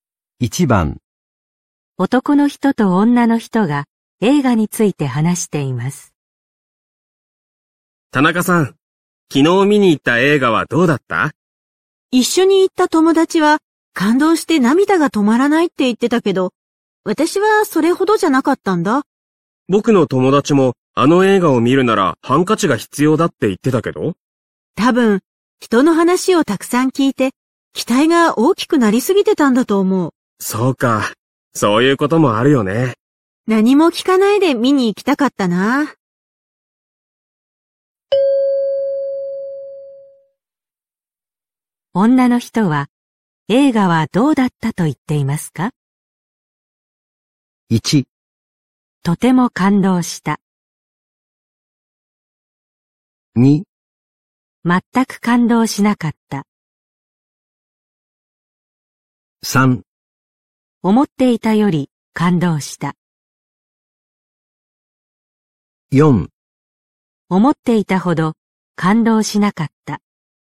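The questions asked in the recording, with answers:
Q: 女の人は、映画はどうだったと言っていますか?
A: 4: 思っていたほど感動しなかった。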